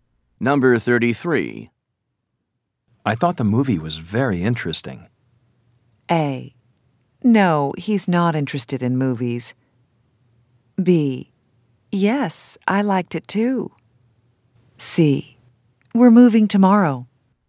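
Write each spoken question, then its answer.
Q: I thought the movie was very interesting.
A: B: Yes, I liked it too.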